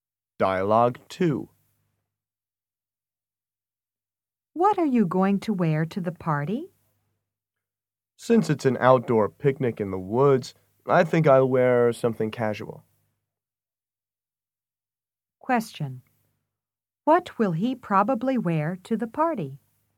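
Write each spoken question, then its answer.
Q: What will he probably wear to the party?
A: Something casual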